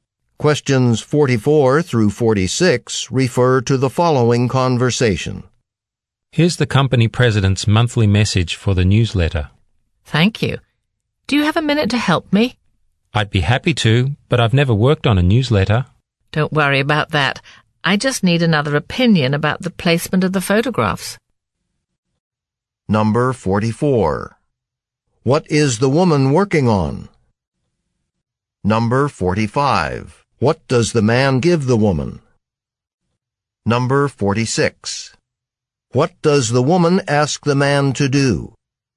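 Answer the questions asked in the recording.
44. A newsletter
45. The company president's monthly message
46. Give an opinion on the placement of photographs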